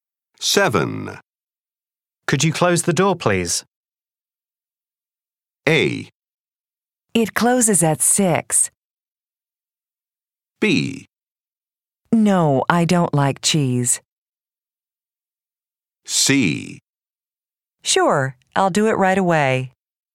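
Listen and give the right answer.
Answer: C: Sure, I'll do it right away.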